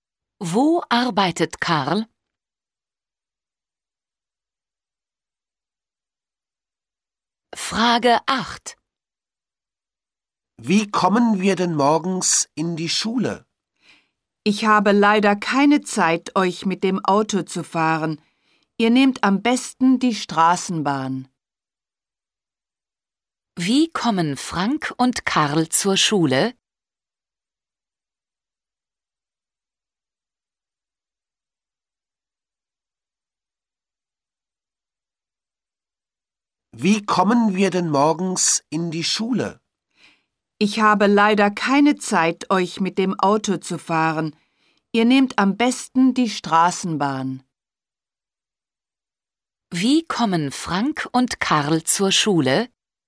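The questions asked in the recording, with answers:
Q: Wie kommen Frank und Karl zur Schule?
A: Mit der Straßenbahn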